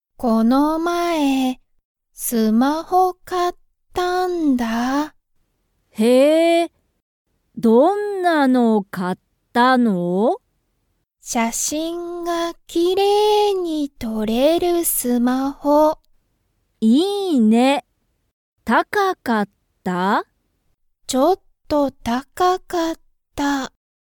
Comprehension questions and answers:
みかのスマホは、写真(しゃしん)が____撮とれる。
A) あまり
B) たくさん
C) きれいに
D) ちょっと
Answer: C) きれいに

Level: Level 1

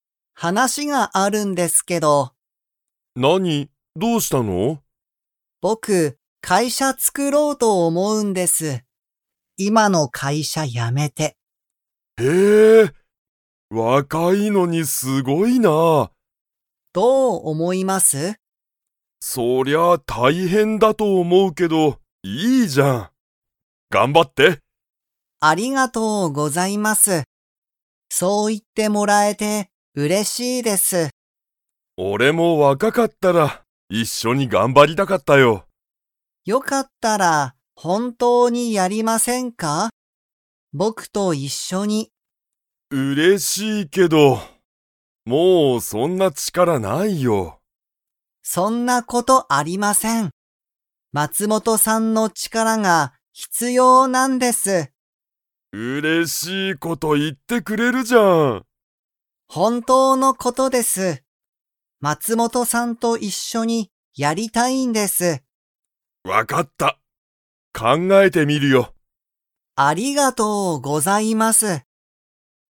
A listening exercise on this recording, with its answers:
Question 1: 木村(きむら)さんは、____と思(おも)う。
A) 会社(かいしゃ)を作(つく)ろう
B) 仕事(しごと)が大変(たいへん)だ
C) 今(いま)の会社(かいしゃ)にいる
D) 若(わか)くなりたい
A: A) 会社(かいしゃ)を作(つく)ろう

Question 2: 木村(きむら)さんは、松本(まつもと)さんと一緒(いっしょ)にやりたいですか?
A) はい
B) いいえ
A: A) はい

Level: Level 2

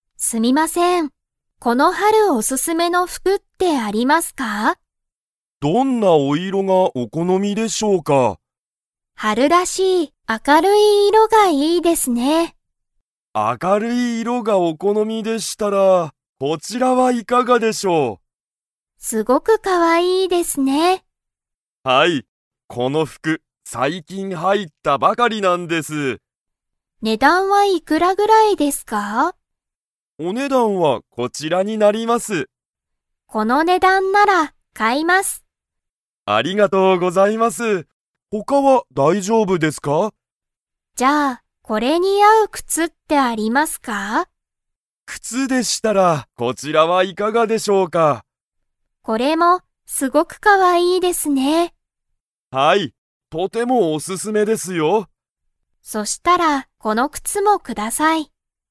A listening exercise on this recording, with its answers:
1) サキは 色いろが好このみだ。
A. 明あかるい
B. 新あたらしい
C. おすすめの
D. 怖こわい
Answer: A. 明あかるい

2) サキは、服ふくだけを買かいますか?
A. はい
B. いいえ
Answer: B. いいえ

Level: Level 4

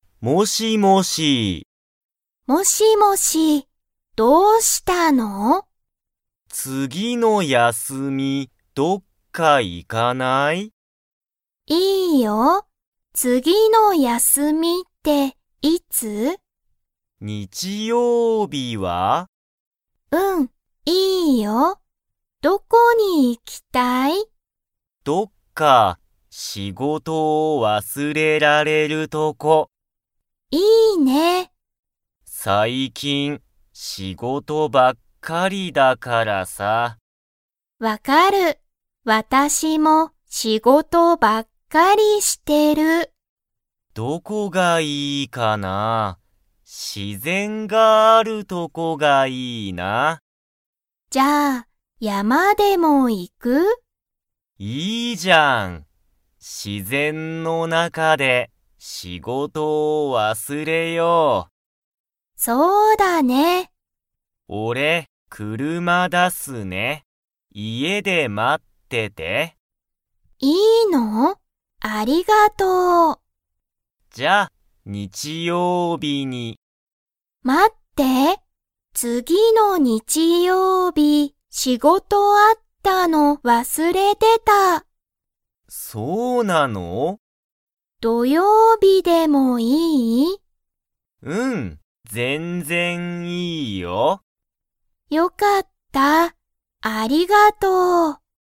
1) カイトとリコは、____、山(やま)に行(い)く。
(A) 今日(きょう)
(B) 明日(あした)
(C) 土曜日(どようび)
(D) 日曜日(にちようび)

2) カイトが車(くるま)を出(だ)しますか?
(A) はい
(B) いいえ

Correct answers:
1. (C) 土曜日(どようび)
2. (A) はい

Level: Level 2

